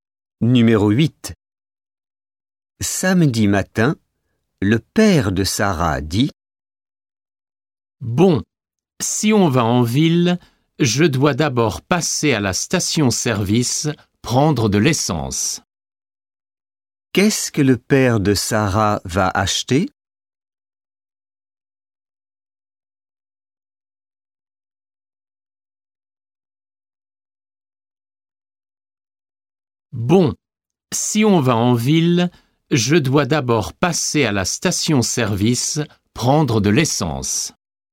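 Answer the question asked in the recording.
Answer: de l'essence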